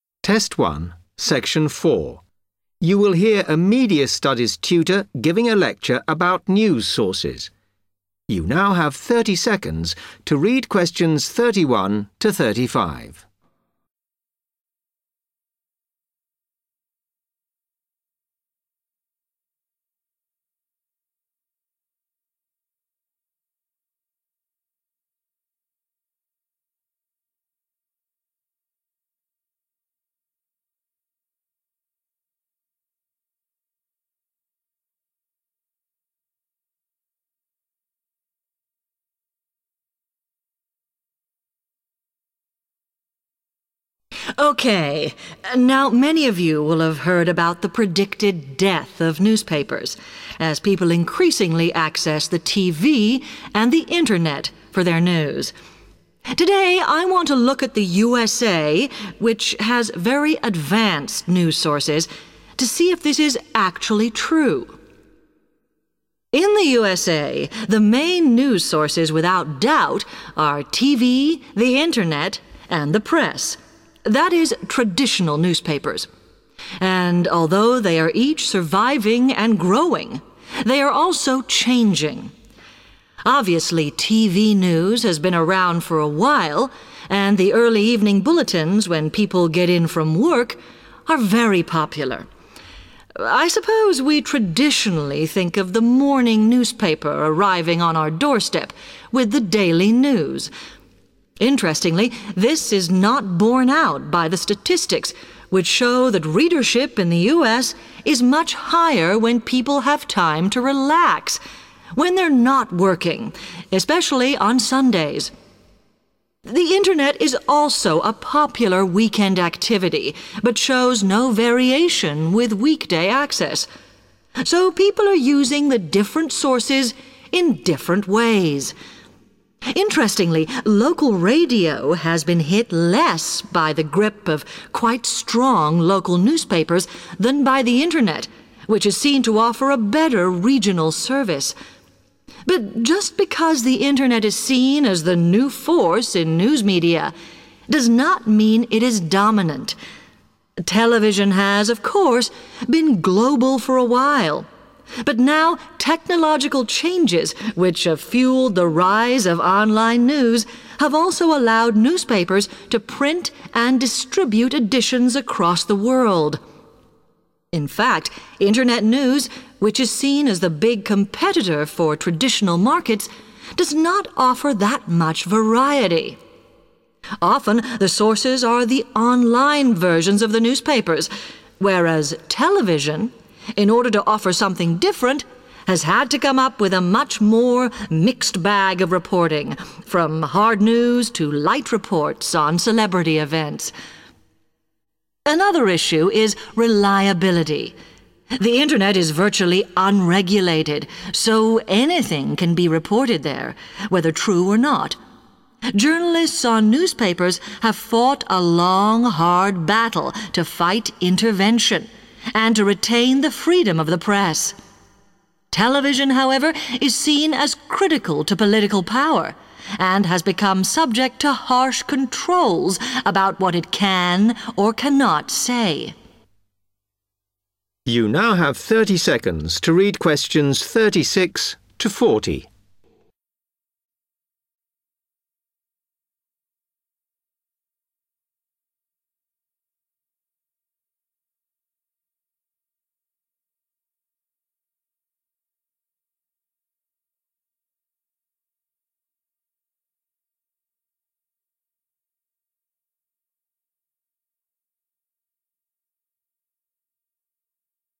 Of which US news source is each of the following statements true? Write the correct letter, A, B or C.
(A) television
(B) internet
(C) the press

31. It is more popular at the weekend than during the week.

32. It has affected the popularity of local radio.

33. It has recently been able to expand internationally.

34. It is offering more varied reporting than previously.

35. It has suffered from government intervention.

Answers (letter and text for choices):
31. (C) the press
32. (B) internet
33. (C) the press
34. (A) television
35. (A) television

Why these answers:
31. The correct answer is C because the lecturer explains that newspaper readership in the United States rises significantly when people have free time and are not at work, particularly on Sundays (the weekend). In contrast, internet news usage stays the same throughout the week without variation.
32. The correct answer is B because the speaker explains that local radio has been negatively affected ("hit") more by the internet than by local newspapers, as the internet provides better regional news coverage. Therefore, the internet matches the statement about affecting the popularity of local radio.
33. The correct answer is C because the lecturer explains that new technology has recently enabled newspapers (the press) to print and share their papers all over the world. In this context, "print and distribute editions across the world" means to "expand internationally". Although television was already global before, it is newspapers that have now gained the ability to expand globally.
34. The correct answer is A because the speaker mentions that television wanted to offer something different, so it created a "mixed bag of reporting" that includes both serious news and light celebrity news. The phrase "mixed bag of reporting" directly matches the idea of "more varied reporting".
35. The correct answer is A because the speaker mentions that television is closely tied to political power and faces strict rules and limits on what it is allowed to report. In the talk, being "subject to harsh controls about what it can or cannot say" means it experiences government intervention.

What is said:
Lecturer: OK, now many of you will have heard about the predicted death of newspapers as people increasingly access the TV and the internet for their news. Today I want to look at the USA, which has very advanced news sources, to see if this is actually true.
In the USA the main news sources without doubt are TV, the internet and the press - that is traditional newspapers. And, although they are each surviving and growing, they are also changing. Obviously TV news has been around for a while, and the early evening bulletins when people get in from work are very popular. I suppose we traditionally think of the morning newspaper arriving on our doorstep with the daily news. Interestingly, this is not borne out by the statistics, which show that readership in the US is much higher when people have time to relax, when they're not working, especially on Sundays. The internet is also a popular weekend activity but shows no variation with weekday access. So people are using the different sources in different ways. Interestingly, local radio has been hit less by the grip of quite strong local newspapers than by the internet, which is seen to offer a better regional service. But just because the internet is seen as the new force in news media does not mean it is dominant. Television has, of course, been global for a while, but now technological changes, which have fuelled the rise of online news, have also allowed newspapers to print and distribute editions across the world. In fact, internet news, which is seen as the big competitor for traditional markets, does not offer that much variety. Often the sources are the online versions of the newspapers, whereas television, in order to offer something different, has had to come up with a much more mixed bag of reporting from hard news to light reports on celebrity events. Another issue is reliability - the internet is virtually unregulated so anything can be reported there, whether true or not. Journalists on newspapers have fought a long hard battle to fight intervention and to retain the freedom of the press. Television, however, is seen as critical to political power and has become subject to harsh controls about what it can or cannot say.